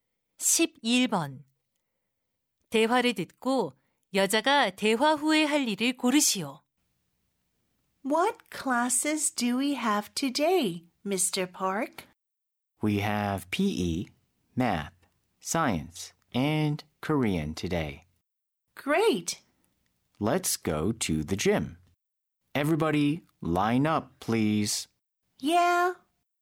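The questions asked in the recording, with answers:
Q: 대화를 듣고 여자가 대화 후에 할 일을 고르시오.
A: 체육관에 가기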